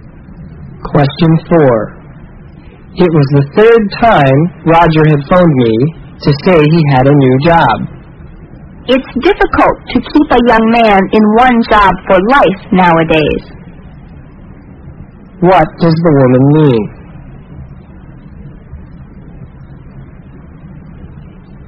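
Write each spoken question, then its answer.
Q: What does the woman mean?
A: Young people often change jobs nowadays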